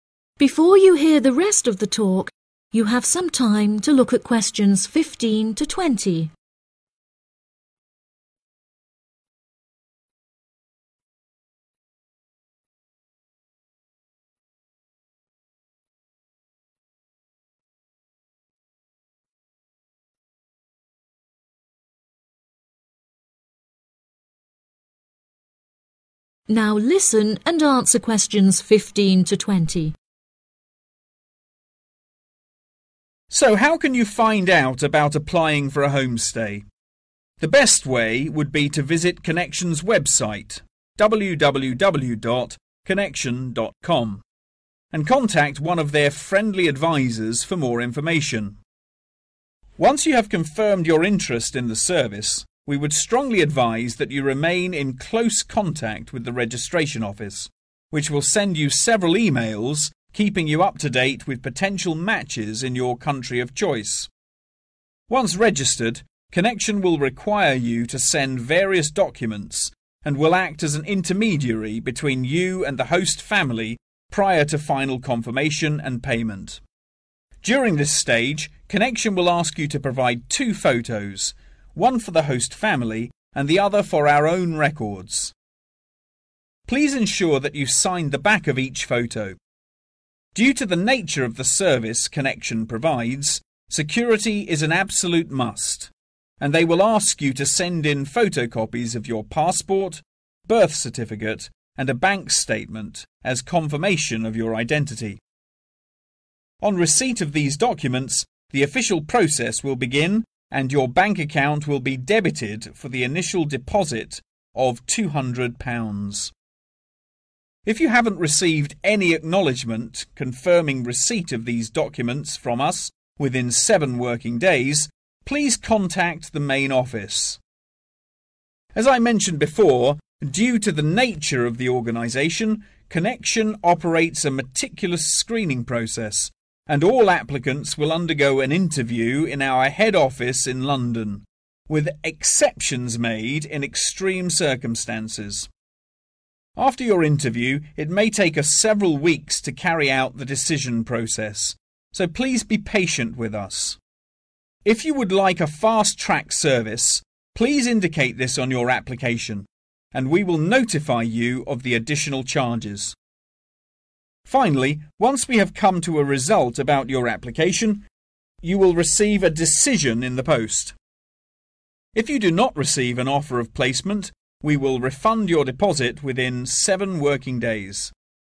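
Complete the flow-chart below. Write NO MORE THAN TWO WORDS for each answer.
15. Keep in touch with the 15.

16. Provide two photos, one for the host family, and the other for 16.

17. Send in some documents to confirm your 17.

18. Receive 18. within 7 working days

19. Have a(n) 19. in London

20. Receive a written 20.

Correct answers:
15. registration office
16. records
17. identity
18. acknowledgement
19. interview
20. decision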